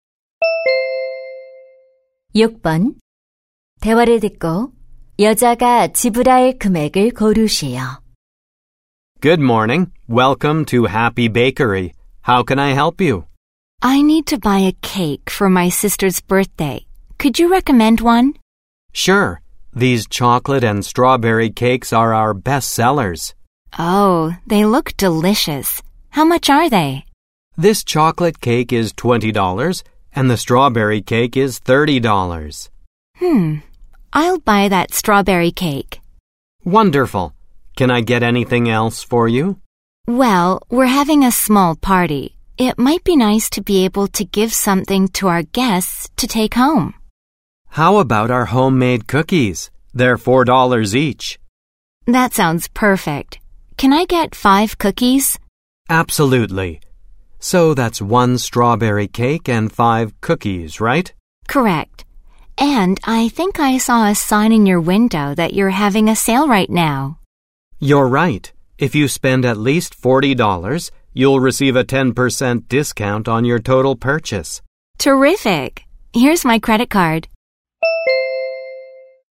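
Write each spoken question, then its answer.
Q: 대화를 듣고 여자가 지불할 금액을 고르시오.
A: 45달러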